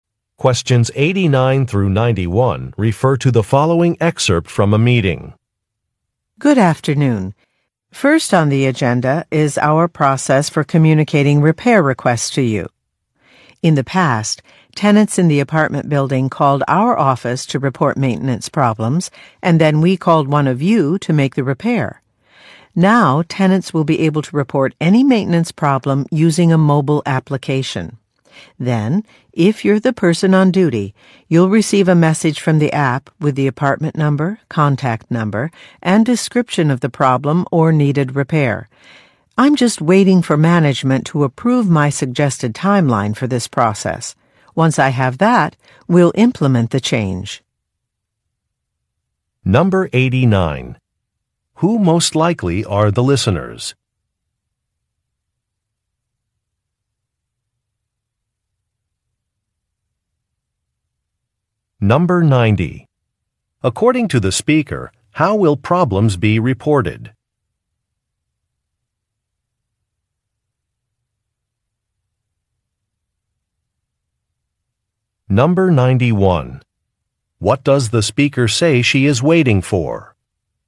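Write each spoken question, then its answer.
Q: Who most likely are the listeners?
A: Maintenance workers

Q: According to the speaker, how will problems be reported?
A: Through a mobile application

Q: What does the speaker say she is waiting for?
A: Management approval of her suggested timeline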